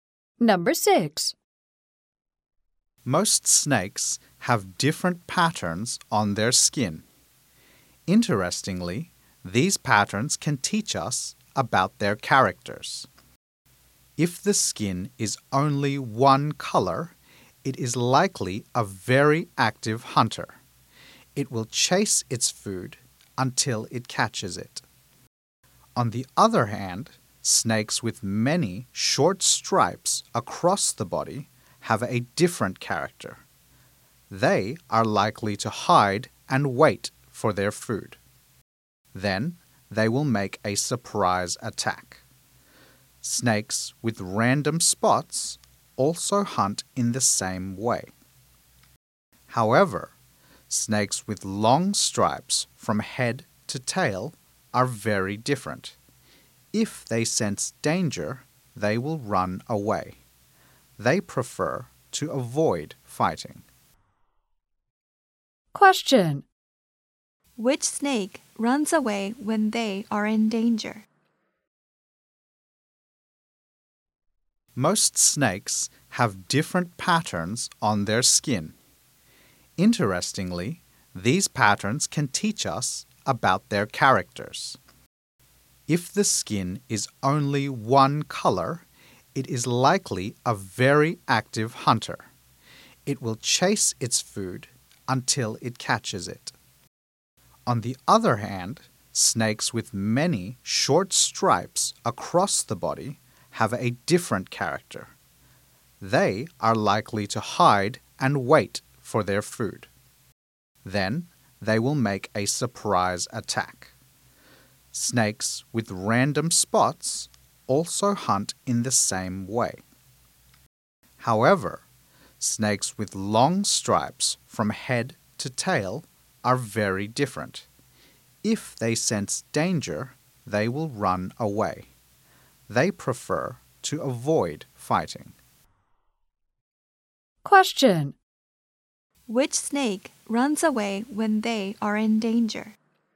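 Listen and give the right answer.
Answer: Snakes with long stripes from head to tail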